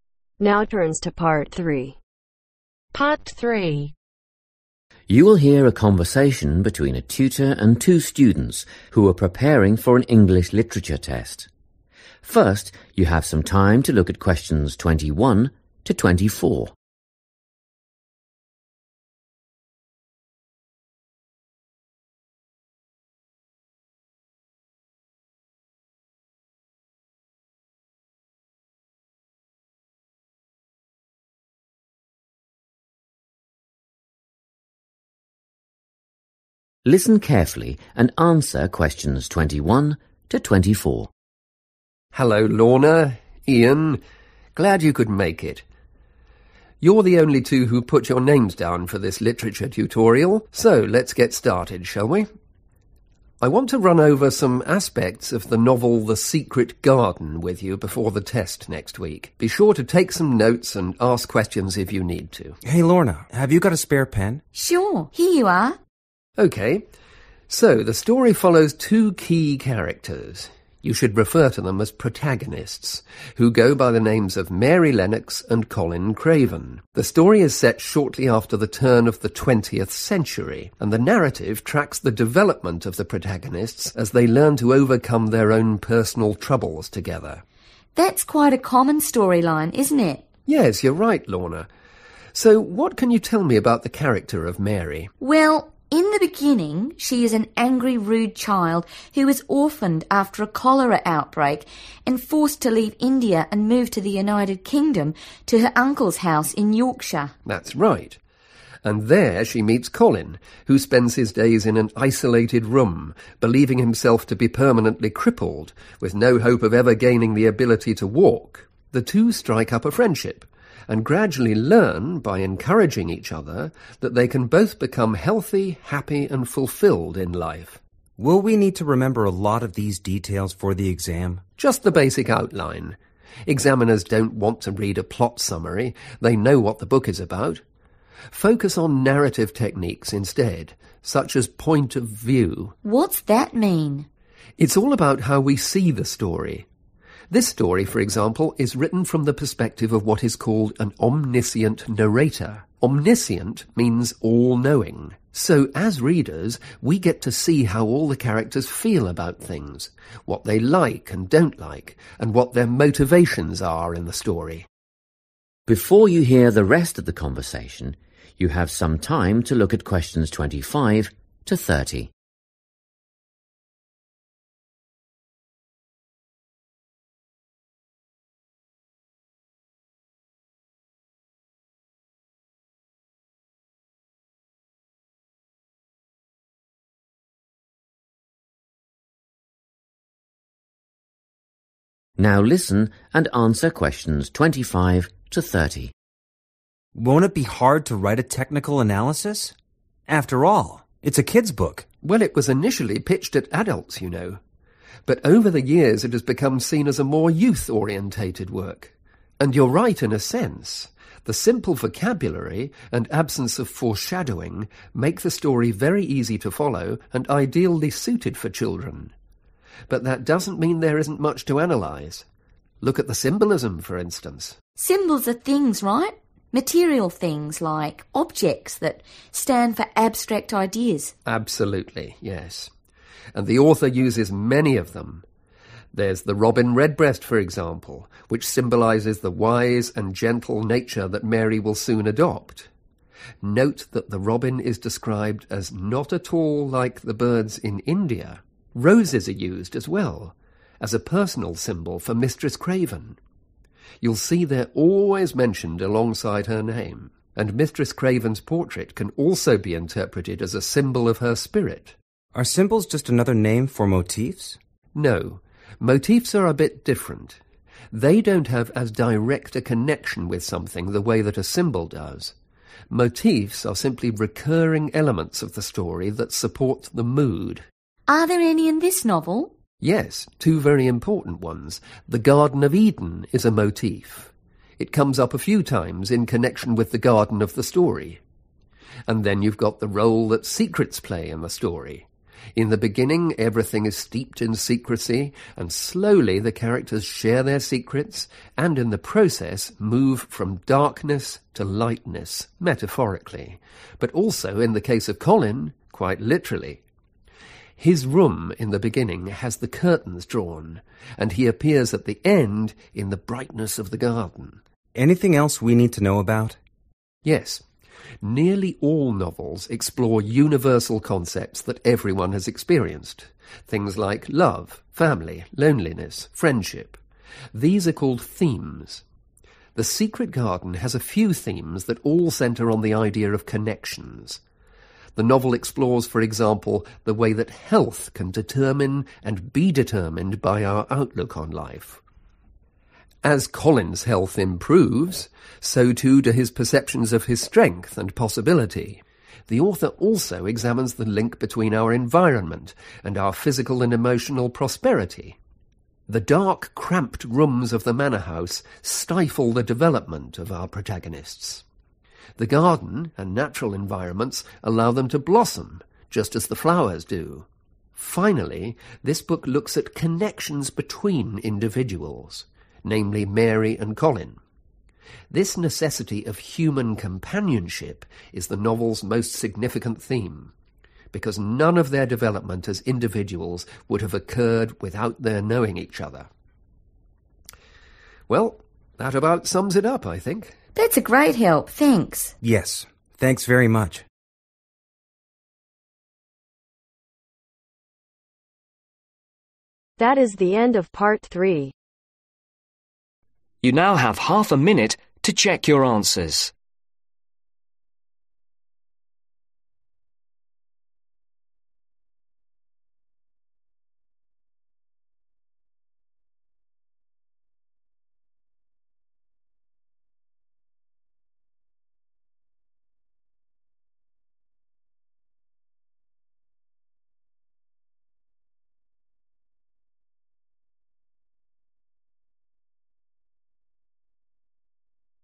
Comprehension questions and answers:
Complete the notes below. Write NO MORE THAN THREE WORDS for each answer.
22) Time period: Early in (22)............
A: (the) 20th/twentieth century

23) to (23)............ . They become friends.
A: Walk

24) opinions and (24)............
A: Motivations/motivation

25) Symbols (physical items that represent (25)............ ):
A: Abstract ideas

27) - secrecy-metaphorical and literal transition from darkness (27)............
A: Light(ness)

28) - (28)............ and outlook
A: Health

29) - (29)............ and well-being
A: Environment

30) - individuals and the need for (30)............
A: Human Companionship